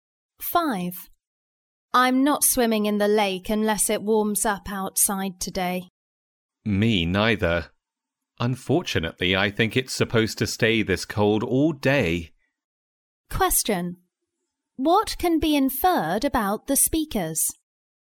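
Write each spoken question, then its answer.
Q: What can be inferred about the speakers?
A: They probably won't swim in the lake today because it's too cold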